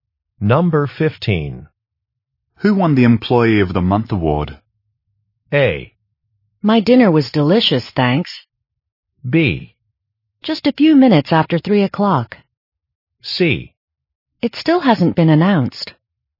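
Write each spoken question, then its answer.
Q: Who won the Employee of the Month award?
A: C: It still hasn't been announced.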